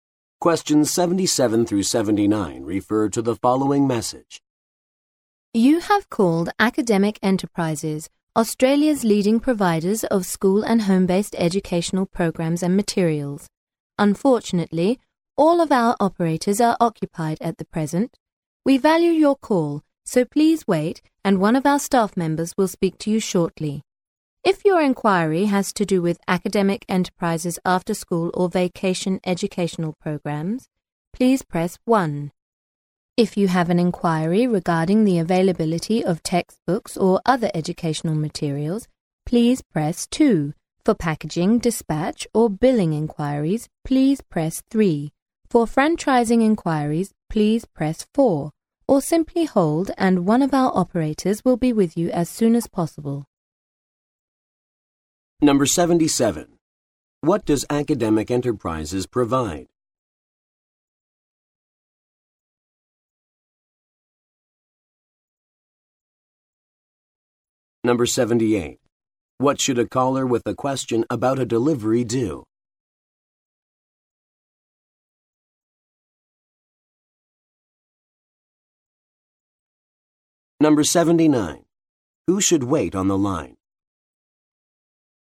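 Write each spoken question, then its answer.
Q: What does Academic Enterprises provide?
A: School and home-based educational programs and materials

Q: What should a caller with a question about a delivery do?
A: Press 3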